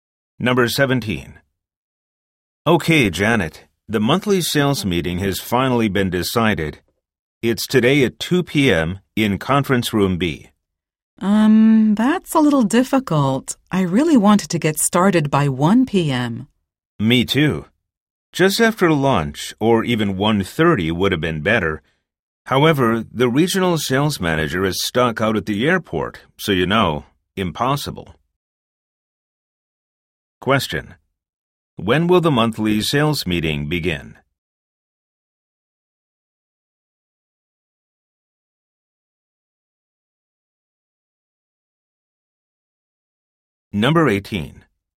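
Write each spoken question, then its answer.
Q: When will the monthly sales meeting begin?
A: At 2 p.m.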